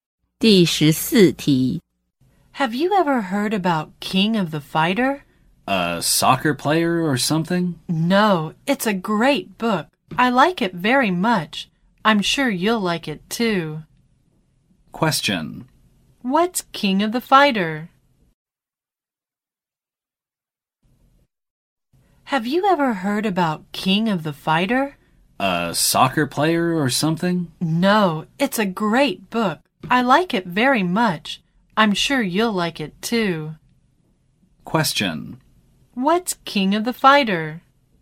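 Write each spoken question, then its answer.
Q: What's King of the Fighter?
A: A book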